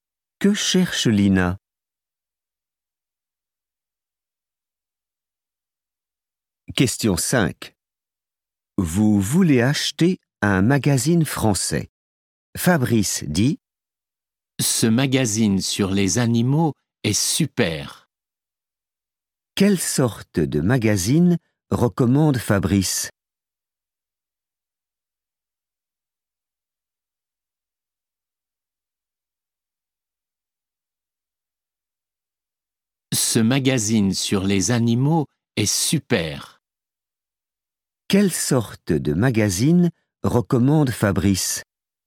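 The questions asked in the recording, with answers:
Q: Quelle sorte de magazine recommande Fabrice?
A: un magazine sur les animaux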